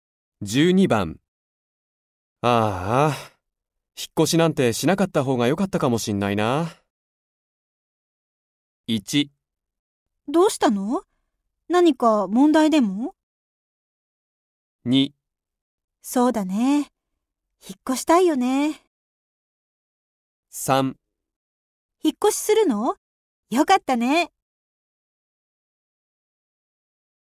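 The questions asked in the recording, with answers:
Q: ああ、引っ越しなんてしなかった方が良かったかもしんないな。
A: 1: どうしたの?何か問題でも?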